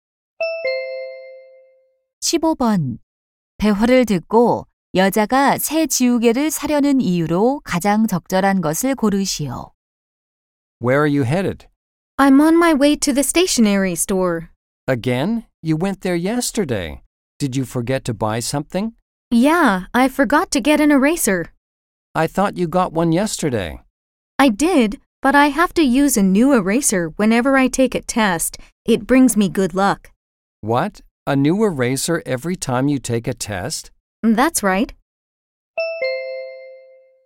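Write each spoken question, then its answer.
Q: 대화를 듣고 여자가 새 지우개를 사려는 이유로 가장 적절한 것을 고르시오.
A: 행운을 가져다주어서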